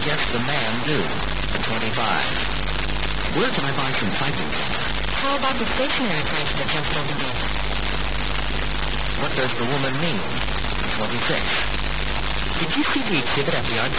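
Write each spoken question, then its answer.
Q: What does the woman mean?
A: He can buy it at the new stationery store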